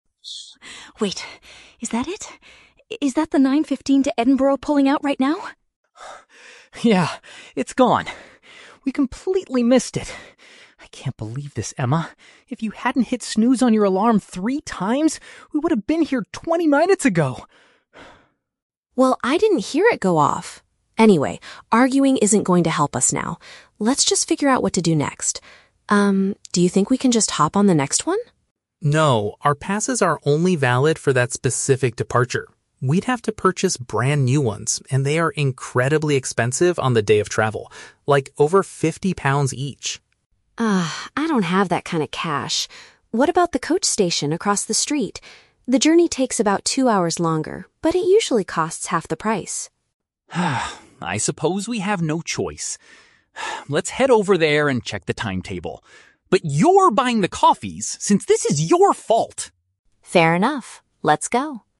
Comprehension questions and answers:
Listen to the conversation between a brother and sister at a station and choose the correct answer (A, B, or C) for each question.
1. What is the main reason they missed their transportation?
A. They spent twenty minutes arguing at the station.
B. One of them failed to wake up on time.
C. They got stuck in heavy morning traffic.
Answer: B. One of them failed to wake up on time.

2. Why do they decide NOT to take the next train?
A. Purchasing replacement passes would cost too much money.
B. They want to save their original tickets for another day.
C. The next departure is fully booked and has no seats left.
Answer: A. Purchasing replacement passes would cost too much money.

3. What do they plan to do next to reach their destination?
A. Buy discounted train tickets at a shop across the street.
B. Wait at a nearby cafe until they have enough money.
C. Check the schedule for a different mode of public transport.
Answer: C. Check the schedule for a different mode of public transport.

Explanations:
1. The Key: Liam complains that Emma "hit snooze on your alarm three times" and she admits she "didn't hear it go off." Option B is a perfect paraphrase for oversleeping. The Trap (A): The words "arguing" and "twenty minutes" are mentioned in the audio, but the argument happened after they missed the train, not before. Plausible (C): Traffic is a very common reason for being late, but nobody mentions it in this conversation.
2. The Key: Liam says they would have to "purchase brand new ones" (tickets) and that they are "incredibly expensive." Option A summarizes this financial problem. The Trap (B): Their original passes are mentioned, but Liam clearly states they are "only valid for that specific departure" (the one they missed), so they cannot be saved or used again. Plausible (C): Trains being fully booked is a realistic problem, but it is never stated in the script.
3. The Key: Emma suggests going to the "coach station" (bus station) and Liam agrees to "check the timetable." Option C paraphrases this as checking the schedule for a different vehicle. The Trap (A): The phrase "across the street" is mentioned, and they discuss something that "costs half the price" (discounted), but this is for a bus (coach), not a train. Plausible (B): Liam does tell Emma she has to buy him a coffee, but they are not going to a cafe to wait for money; they are going to buy bus tickets.

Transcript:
Emma: Wait... is that it? Is that the 9:15 to Edinburgh pulling out right now?
Liam: Yeah. It's gone. We completely missed it. I can't believe this, Emma. If you hadn't hit snooze on your alarm three times, we would have been here twenty minutes ago!
Emma: Well, I didn't hear it go off! Anyway, arguing isn't going to help us now. Let's just figure out what to do next. Um, do you think we can just hop on the next one?
Liam: No, our passes are only valid for that specific departure. We'd have to purchase brand new ones, and they are incredibly expensive on the day of travel. Like, over fifty pounds each!
Emma: Ugh, I don't have that kind of cash. What about the coach station across the street? The journey takes about two hours longer, but it usually costs half the price.
Liam: I suppose we have no choice. Let's head over there and check the timetable. But you're buying the coffees since this is your fault!

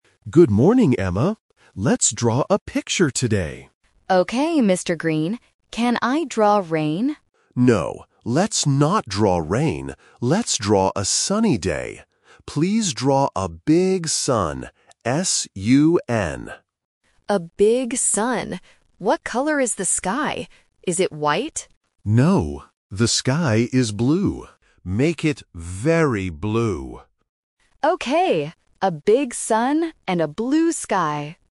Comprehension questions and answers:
Listen to the conversation between an art teacher and a student. Circle the correct answer (A, B, or C).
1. What weather are they drawing?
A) Raining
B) Sunny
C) Windy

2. What word does Mr. Green spell?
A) S-K-Y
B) S-U-N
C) B-L-U-E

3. What color is the sky in the picture?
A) White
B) Yellow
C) Blue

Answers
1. B) Sunny
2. B) S-U-N
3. C) Blue

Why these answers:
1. The Key: Mr. Green clearly says, "Let's draw a sunny day." The Trap: Option (A) "Raining" is mentioned because Emma asks "Can I draw rain?", but the teacher says "No". Not Mentioned: Option (C) "Windy" is never mentioned in the audio.
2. The Key: Mr. Green says, "Please draw a big sun," and then he spells the word: "S-U-N." The Trap: Option (A) "S-K-Y" and Option (C) "B-L-U-E" are words in the conversation, but the teacher does not spell them.
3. The Key: Mr. Green tells Emma, "the sky is blue." Emma repeats it at the end: "a blue sky!" The Trap: Option (A) "White" is mentioned by Emma when she asks "Is it white?", but the teacher says "No". Not Mentioned: Option (B) "Yellow" is not in the audio.

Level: A1

